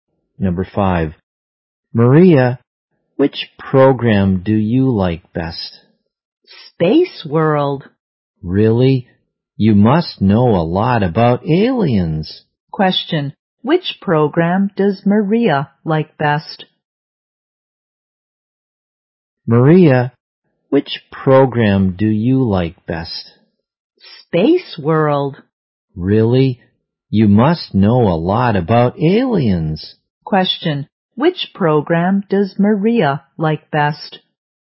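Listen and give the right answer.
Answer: Space World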